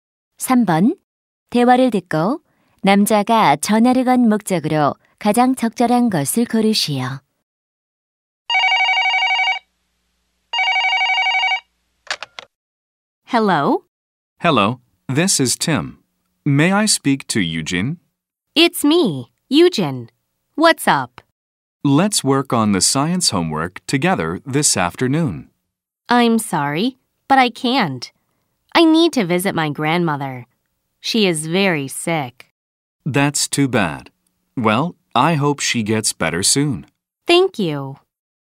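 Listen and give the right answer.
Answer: 과학 숙제를 함께 하자고 제안하려고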